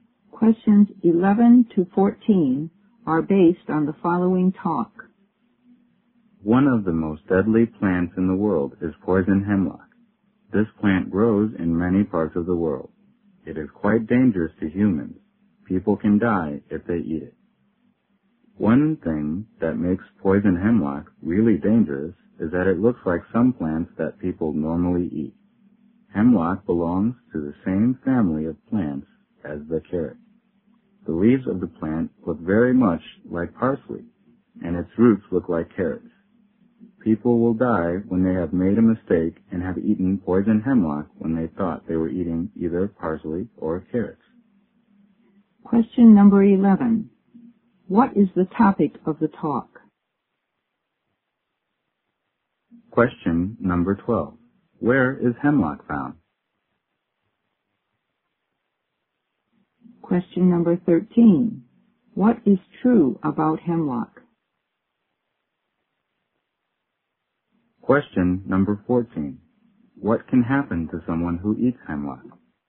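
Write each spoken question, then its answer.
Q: What is the topic of the talk?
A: Poison hemlock, a deadly plant

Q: Where is hemlock found?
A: In many parts of the world

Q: What is true about hemlock?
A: It looks like parsley and carrots, which people eat

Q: What can happen to someone who eats hemlock?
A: They can die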